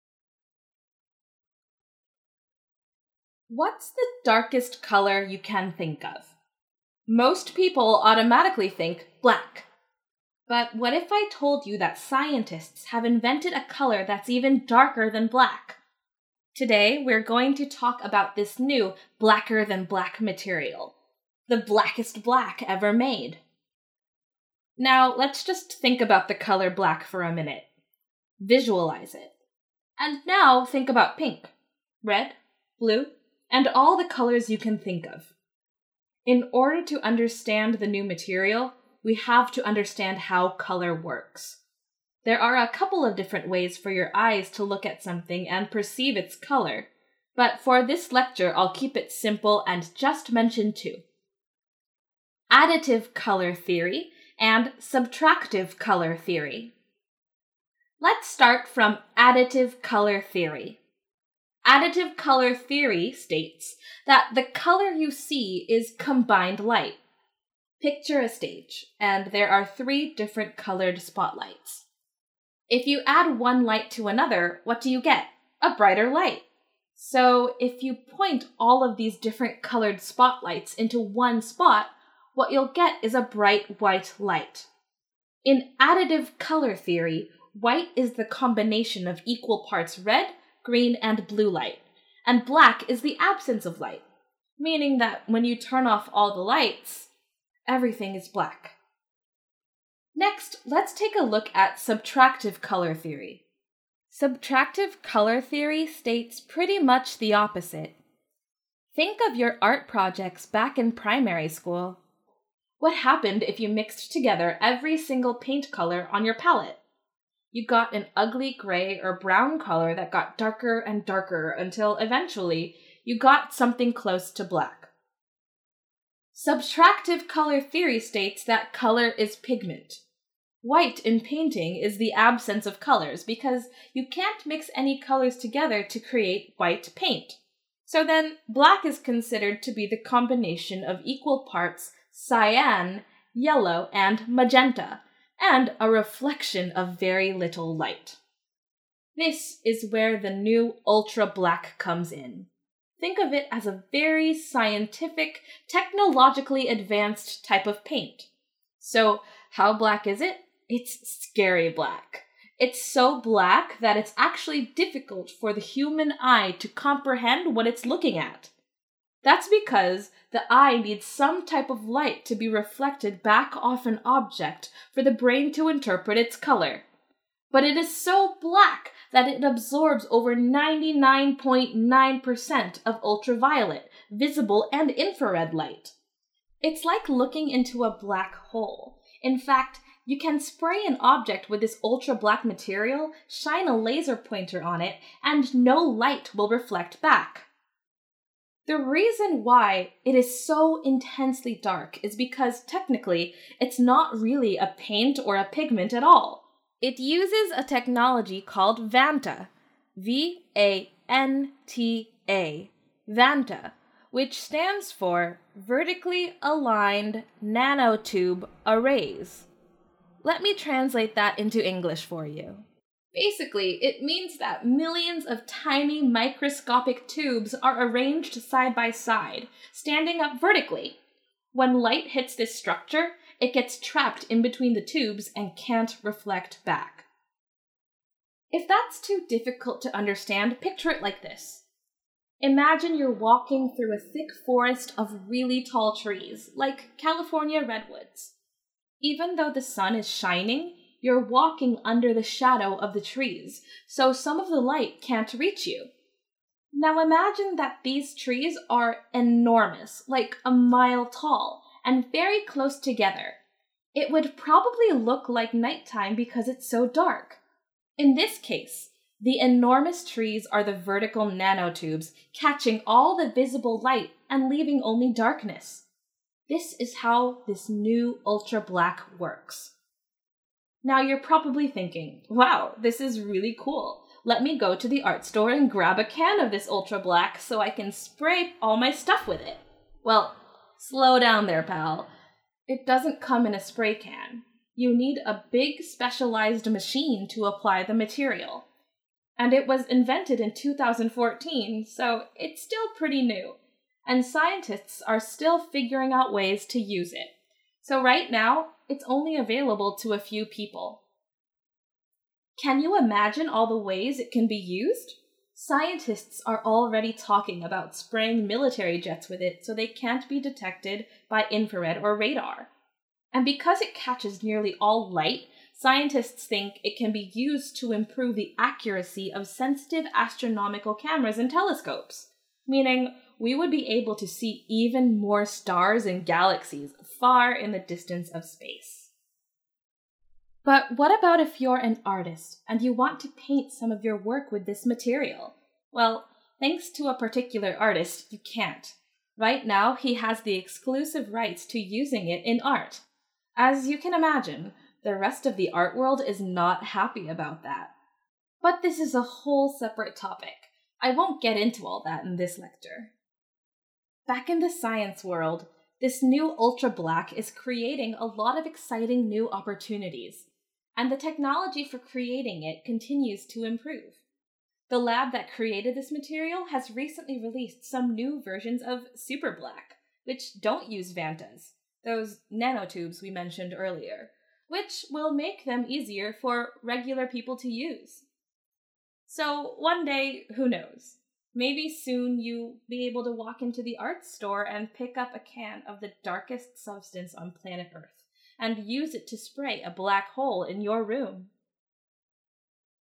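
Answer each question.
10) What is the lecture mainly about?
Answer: The blackest substance ever made

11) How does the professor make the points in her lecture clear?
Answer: She provides students with analogies and visualizations.

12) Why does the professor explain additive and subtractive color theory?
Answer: To explain the difference between the new ultra-black and regular black

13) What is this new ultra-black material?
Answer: A collection of nanotubes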